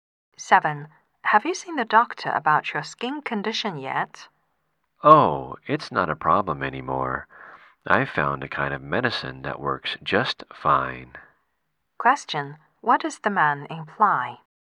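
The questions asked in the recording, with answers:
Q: What does the man imply?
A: He doesn't need to see the doctor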